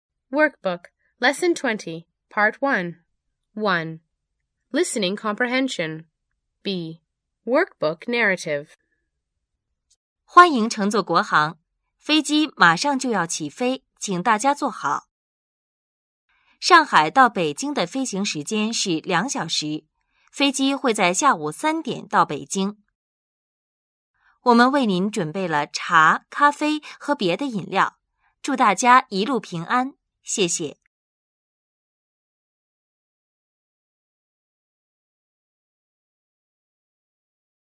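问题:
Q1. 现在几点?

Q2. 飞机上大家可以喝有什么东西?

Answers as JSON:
{"1": "下午一点", "2": "茶、咖啡和别的饮料"}

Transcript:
飞机马上就要起飞,请大家坐好。上海到北京的飞行时间(flying time)是两小时,飞机会在下午三点到北京。我们为您准备(zhǔn beì, prepare)了茶,咖啡和别的饮料(beverage)。祝大家一路平安。谢谢。

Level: Beginning Chinese II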